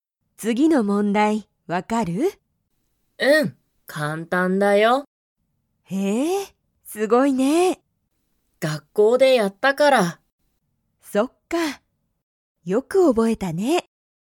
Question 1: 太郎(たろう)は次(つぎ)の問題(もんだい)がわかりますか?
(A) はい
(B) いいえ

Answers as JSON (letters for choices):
{"1": "A"}

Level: Level 1